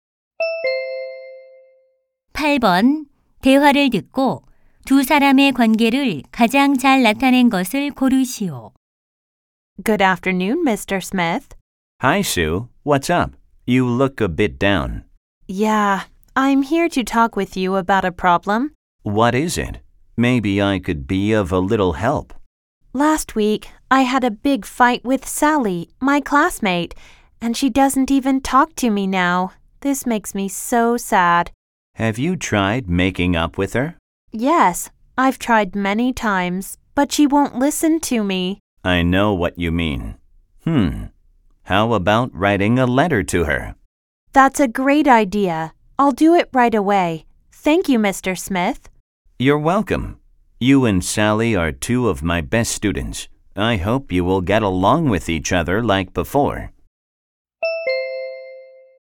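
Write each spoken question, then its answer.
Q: 대화를 듣고 두 사람의 관계를 가장 잘 나타낸 것을 고르시오.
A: 교사 - 학생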